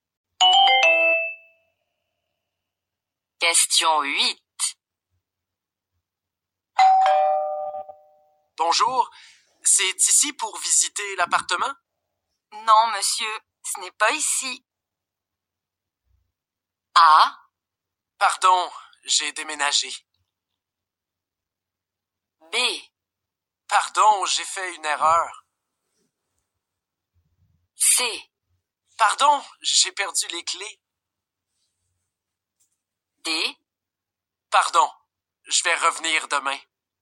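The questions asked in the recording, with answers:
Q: Non, monsieur, ce n'est pas ici.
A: B: Pardon, j'ai fait une erreur.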